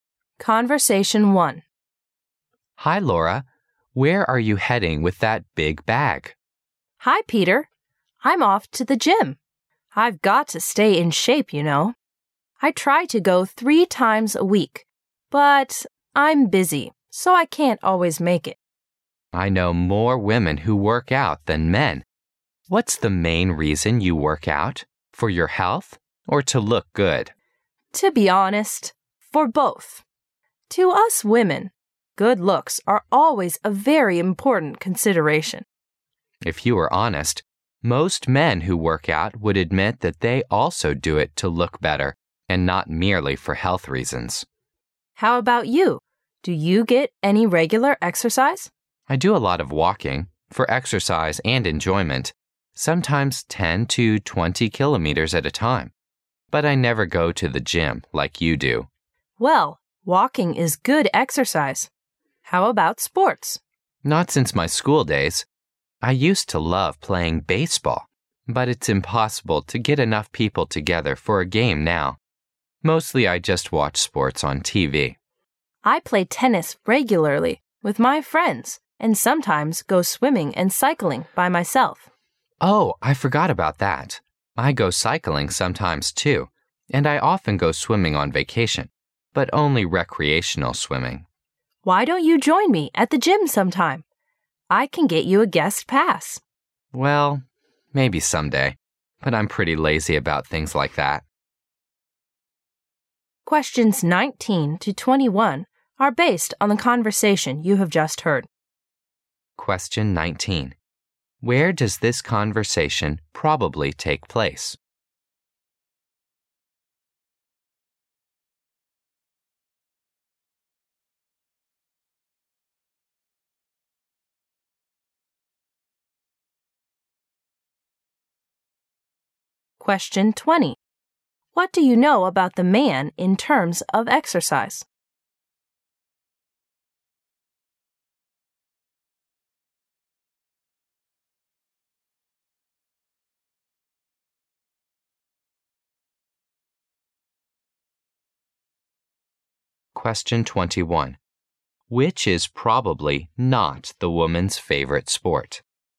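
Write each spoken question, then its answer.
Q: What do you know about the man in terms of exercise?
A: He walks a lot, sometimes 10 to 20 kilometers at a time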